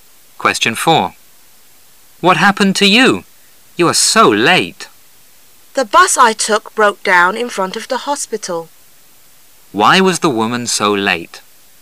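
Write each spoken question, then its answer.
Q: Why was the woman so late?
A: Her bus broke down in front of the hospital.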